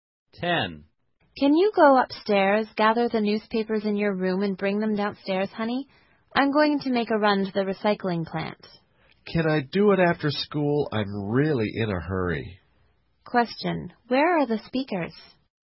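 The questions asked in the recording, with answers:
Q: where are the speakers?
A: At home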